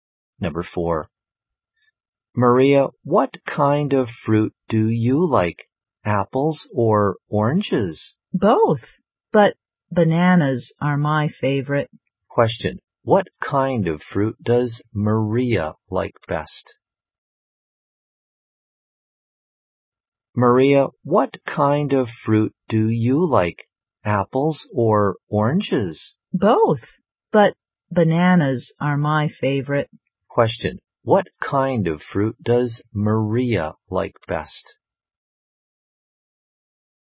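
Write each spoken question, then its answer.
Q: What kind of fruit does Maria like best?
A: Bananas.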